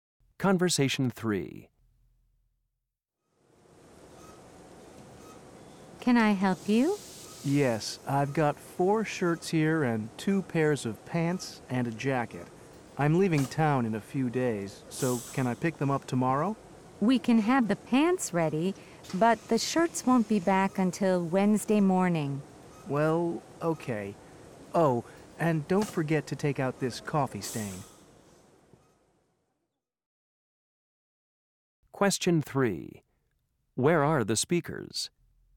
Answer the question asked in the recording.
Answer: We're the best dry cleaners in town.